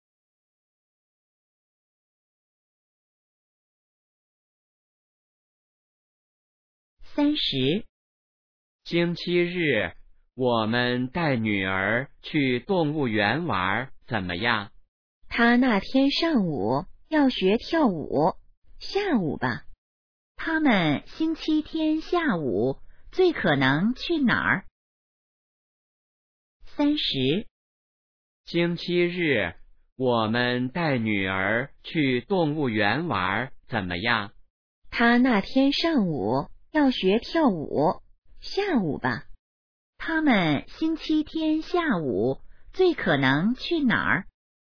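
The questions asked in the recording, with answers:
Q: 他们星期天下午最可能去哪儿?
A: 动物园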